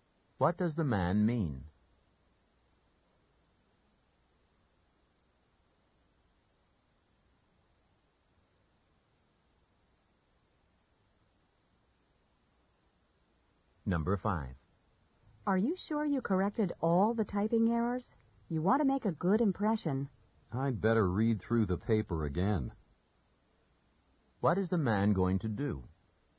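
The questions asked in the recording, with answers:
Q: What is the man going to do?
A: Read through the paper again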